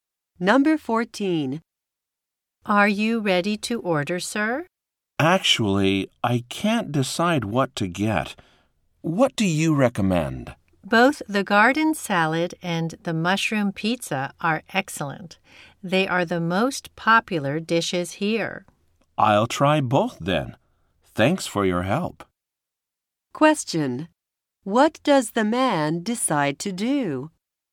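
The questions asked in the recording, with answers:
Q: What does the man decide to do?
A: Order both the garden salad and the mushroom pizza.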